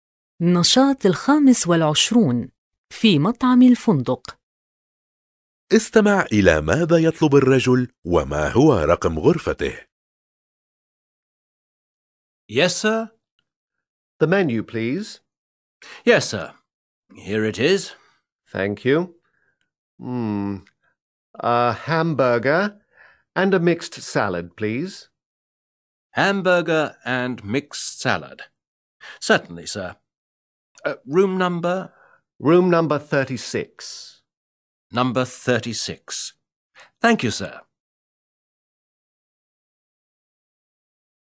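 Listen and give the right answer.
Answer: همبرغر وسلطة مشكلة، والغرفة رقم 36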